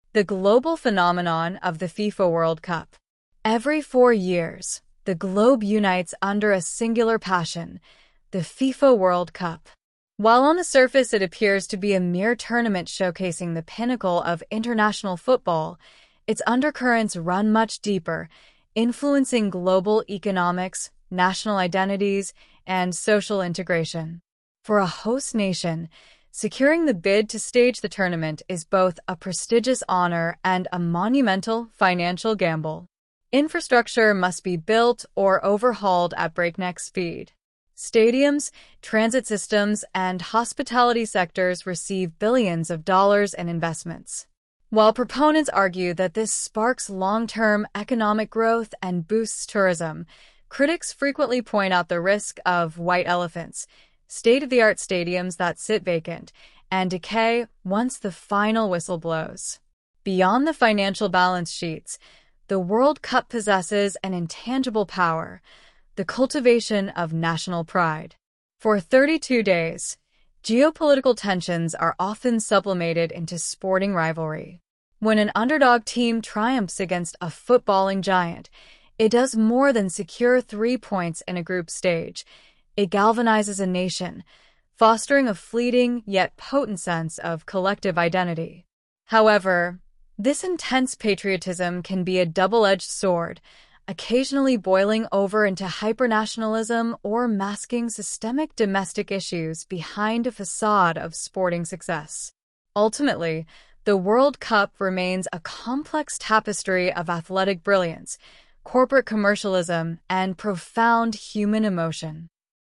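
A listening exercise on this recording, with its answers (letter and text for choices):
Listen carefully to the following audio and choose the correct answer.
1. What is the primary purpose of the listening text?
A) To chronicle the historical evolution of the FIFA World Cup.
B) To critique the financial corruption within international sports organizations.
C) To analyze the multi-faceted economic and social impacts of the World Cup.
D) To argue that underdog teams deserve more representation in the tournament.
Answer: C) To analyze the multi-faceted economic and social impacts of the World Cup.

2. According to the text, what is a "white elephant" in the context of the World Cup?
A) A rare and highly prized mascot used to boost merchandise sales.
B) An expensive infrastructure project that becomes useless after the event.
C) A corporate sponsor that fails to generate a profit from the tournament.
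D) A host nation that goes into severe bankruptcy due to poor planning.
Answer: B) An expensive infrastructure project that becomes useless after the event.

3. The text states that for a host nation, securing the bid is a "monumental financial gamble." What does this imply?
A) Host nations often lose the rights to the tournament at the last minute.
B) The financial returns of hosting are highly uncertain and risky.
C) FIFA requires countries to bid using national lottery funds.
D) Tourism is guaranteed to decline immediately following the bid selection.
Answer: B) The financial returns of hosting are highly uncertain and risky.

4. How are geopolitical tensions described as being handled during the World Cup?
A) They are permanently resolved through international diplomacy.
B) They are completely ignored by fans and media outlets alike.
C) They are temporarily redirected into athletic competition.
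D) They are exacerbated, leading to increased conflict outside the stadiums.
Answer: C) They are temporarily redirected into athletic competition.

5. What effect does an underdog victory have on a nation, according to the speaker?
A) It unites the citizens and creates a strong, temporary sense of shared identity.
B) It guarantees the country will win the entire tournament.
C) It causes immediate economic inflation due to over-celebration.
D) It discourages youth from participating in local sports programs.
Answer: A) It unites the citizens and creates a strong, temporary sense of shared identity.

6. Why does the author describe patriotism during the World Cup as a "double-edged sword"?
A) Because it helps teams win matches but lowers player morale.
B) Because it can unite a country but also transform into harmful hyper-nationalism.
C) Because it increases ticket sales but reduces television viewership numbers.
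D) Because it satisfies local citizens but alienates international tourists.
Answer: B) Because it can unite a country but also transform into harmful hyper-nationalism.

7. Based on the text, what do proponents of hosting the World Cup argue?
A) It distracts the public from serious domestic political scandals.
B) It serves as a catalyst for long-term economic development and tourism.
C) It reduces the need for modernizing public transit systems.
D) It eliminates financial disparities between wealthy and poor nations.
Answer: B) It serves as a catalyst for long-term economic development and tourism.

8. Which sectors are mentioned as receiving billions of dollars in investments prior to the tournament?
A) Technology, agriculture, and military defense.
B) Education, healthcare, and renewable energy.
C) Stadiums, transit systems, and hospitality.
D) Environmental conservation and international trade.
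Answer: C) Stadiums, transit systems, and hospitality.

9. What does the phrase "masking systemic domestic issues behind a facade of sporting success" mean?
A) Using the excitement of the tournament to temporarily hide a country's internal problems.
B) Improving the infrastructure of a country so thoroughly that poverty is eradicated.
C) Requiring athletes to wear masks during opening ceremonies for cultural reasons.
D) Forcing local citizens to pretend to be happy when international media arrives.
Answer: A) Using the excitement of the tournament to temporarily hide a country's internal problems.

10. What is the speaker's overall tone toward the FIFA World Cup?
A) Purely dismissive and highly critical of sports culture.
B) Uncritically enthusiastic and celebratory of corporate sponsors.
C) Objective and analytical, recognizing both positive and negative dimensions.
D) Indifferent and bored by the concept of international tournaments.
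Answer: C) Objective and analytical, recognizing both positive and negative dimensions.

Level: High Intermediate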